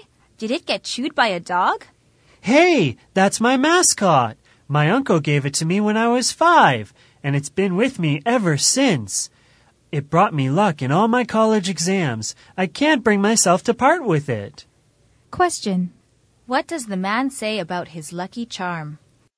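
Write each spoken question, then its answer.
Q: What does the man say about his lucky charm?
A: He has had it since he was 5 and can't part with it; it brought him luck in his exams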